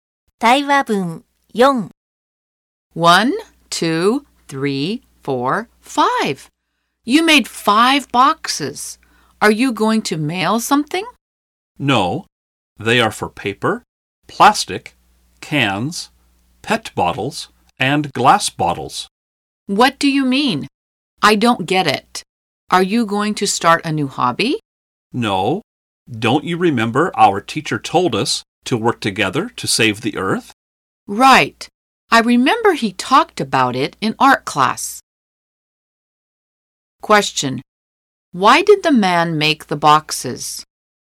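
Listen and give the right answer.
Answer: To sort waste for recycling and save the earth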